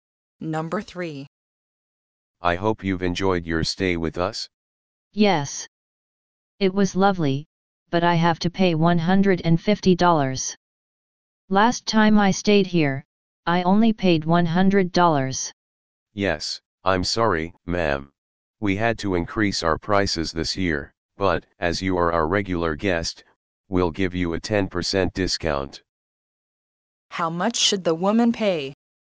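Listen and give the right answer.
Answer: $135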